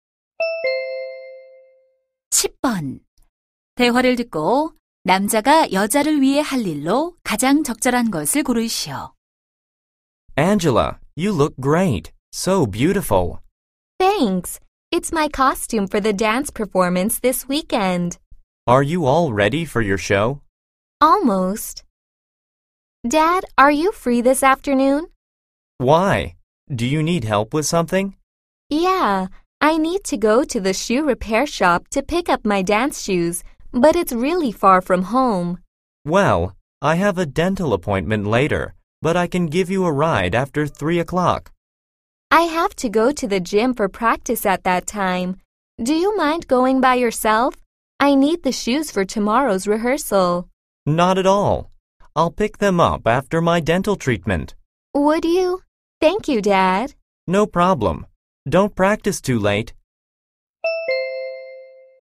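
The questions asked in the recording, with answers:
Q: 대화를 듣고 남자가 여자를 위해 할 일로 가장 적절한 것을 고르시오.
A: 수선된 댄스화 찾아오기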